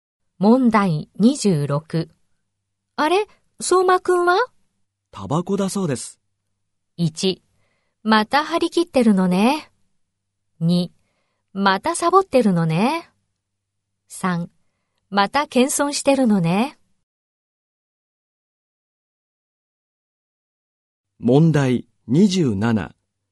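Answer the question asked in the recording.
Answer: 2: またサボってるのね。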